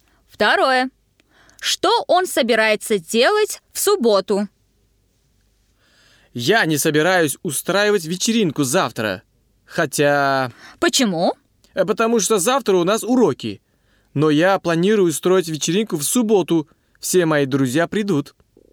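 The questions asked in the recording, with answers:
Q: Что он собирается делать в субботу?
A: Устроить вечеринку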